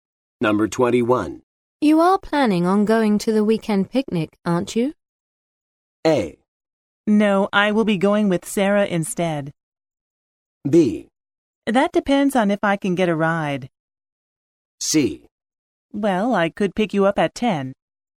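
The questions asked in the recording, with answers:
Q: You are planning on going to the weekend picnic, aren't you?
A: B: That depends on if I can get a ride.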